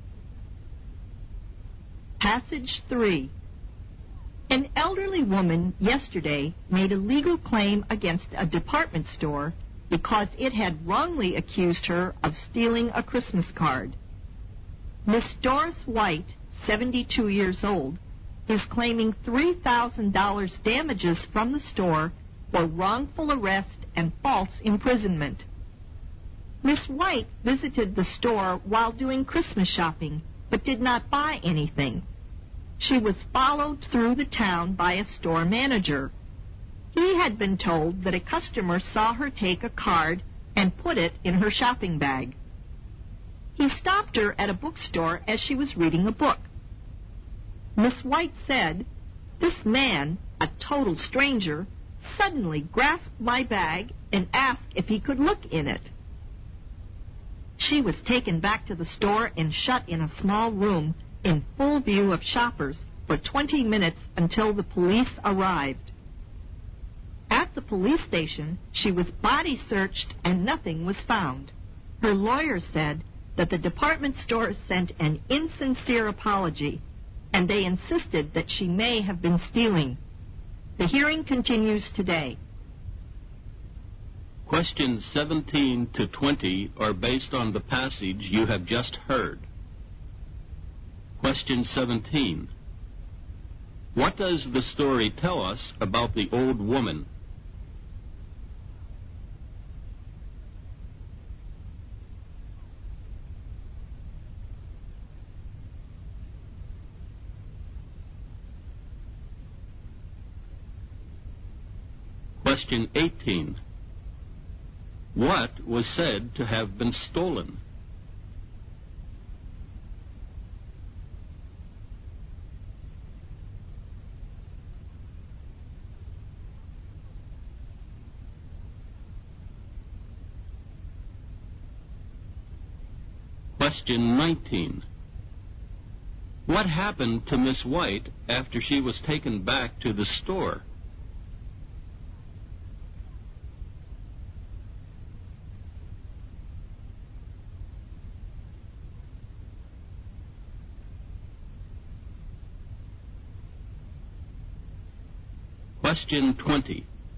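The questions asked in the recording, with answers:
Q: What was said to have been stolen?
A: A Christmas card

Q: What happened to Miss White after she was taken back to the store?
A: She was shut in a small room in full view of shoppers for 20 minutes until the police came

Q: What was now the attitude of the department store in this legal case?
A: It insisted she may have been stealing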